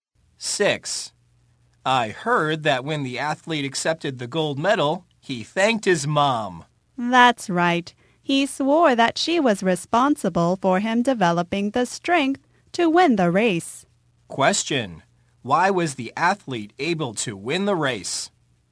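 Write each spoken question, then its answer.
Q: Why was the athlete able to win the race?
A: His mom helped him develop the strength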